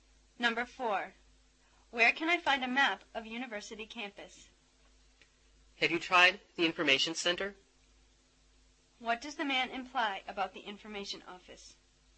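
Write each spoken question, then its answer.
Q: What does the man imply about the information office?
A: It might have a campus map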